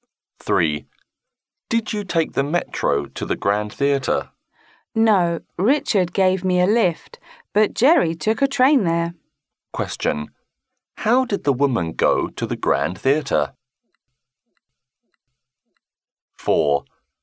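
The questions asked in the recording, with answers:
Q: How did the woman go to the Grand Theatre?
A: By car; Richard gave her a lift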